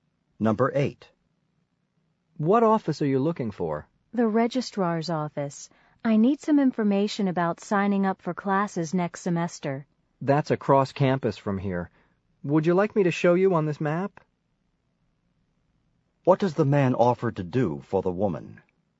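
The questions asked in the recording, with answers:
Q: What does the man offer to do for the woman?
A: Show her the registrar's office on the map.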